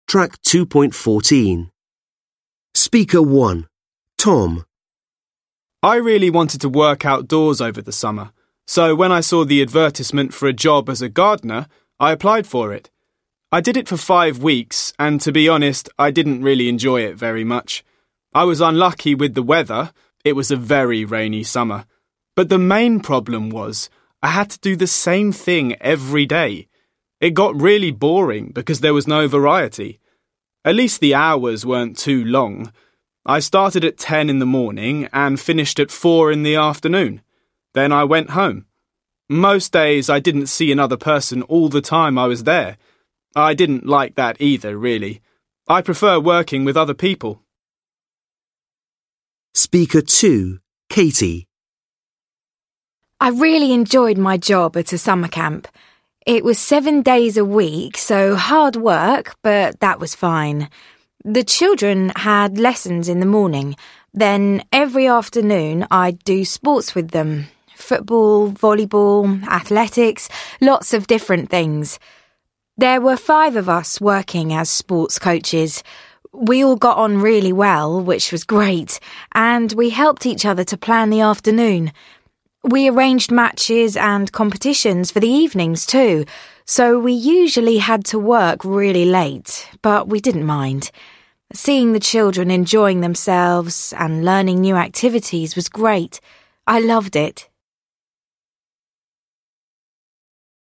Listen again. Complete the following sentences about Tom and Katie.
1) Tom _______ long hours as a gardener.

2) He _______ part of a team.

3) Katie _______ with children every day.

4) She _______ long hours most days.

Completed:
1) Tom didn't work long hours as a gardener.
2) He wasn't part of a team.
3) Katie worked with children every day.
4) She worked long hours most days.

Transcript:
Tom: I really wanted to work outdoors over the summer, so when I saw the advertisement for a job as a gardener, I applied for it. I did it for five weeks, and to be honest, I didn't really enjoy it very much. I was unlucky with the weather – it was a very rainy summer. But the main problem was, I had to do the same thing every day. It got really boring because there was no variety. At least the hours weren't too long. I started at ten in the morning and finished at four in the afternoon. Then I went home. Most days, I didn't see another person all the time I was there. I didn't like that either, really. I prefer working with other people.
Katie: I really enjoyed my job at a summer camp. It was seven days a week, so hard work, but that was fine. The children had lessons in the morning. Then every afternoon, I'd do sports with them: football, volleyball, athletics, lots of different things. There were five of us working as sports coaches. We all got on really well, which was great, and we helped each other to plan the afternoon. We arranged matches and competitions for the evenings too, so we usually had to work really late – but we didn't mind. Seeing the children enjoying themselves and learning new activities was great. I loved it.

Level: Lớp 10